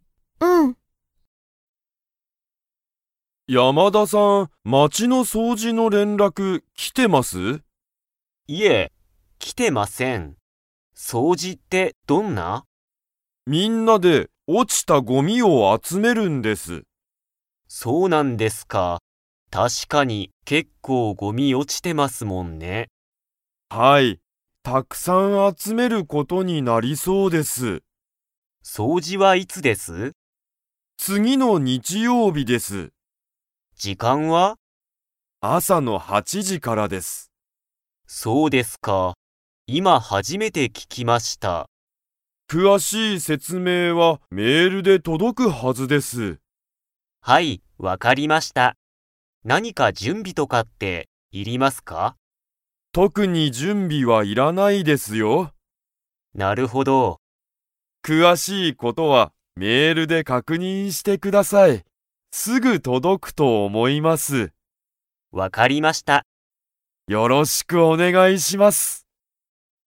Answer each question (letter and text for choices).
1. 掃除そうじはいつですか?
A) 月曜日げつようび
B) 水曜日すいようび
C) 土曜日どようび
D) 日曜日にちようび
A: D) 日曜日にちようび

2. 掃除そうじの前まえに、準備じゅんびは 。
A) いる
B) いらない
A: B) いらない

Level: Level 4